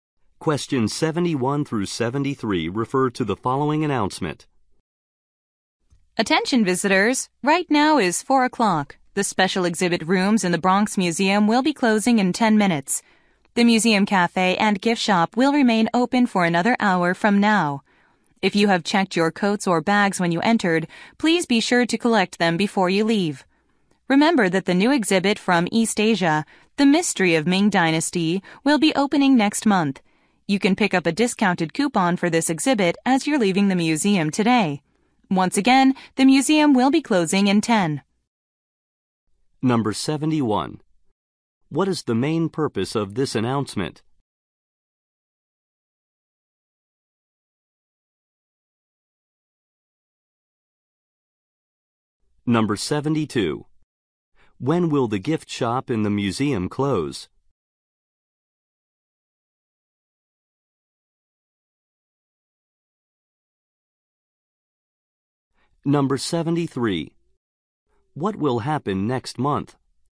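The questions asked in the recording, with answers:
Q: What is the main purpose of this announcement?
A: To tell visitors the museum is closing soon

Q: When will the gift shop in the museum close?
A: At 5 o'clock, in one hour

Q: What will happen next month?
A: A new East Asia exhibit, The Mystery of Ming Dynasty, will open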